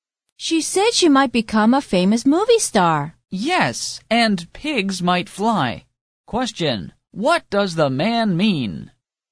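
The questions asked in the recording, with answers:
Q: what does the man mean?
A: It is very unlikely she will become a famous movie star.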